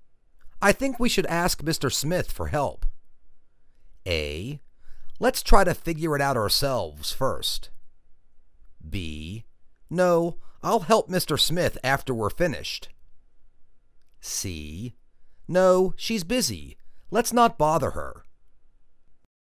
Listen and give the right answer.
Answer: Let's try to figure it out ourselves first.